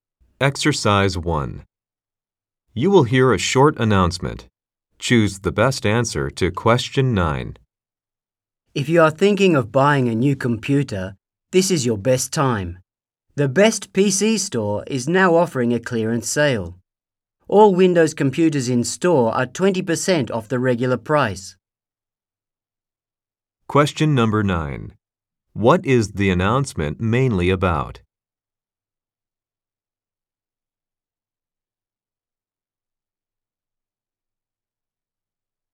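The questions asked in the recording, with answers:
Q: What is the announcement mainly about?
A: A clearance sale on computers at the Best PC Store (20% off Windows computers)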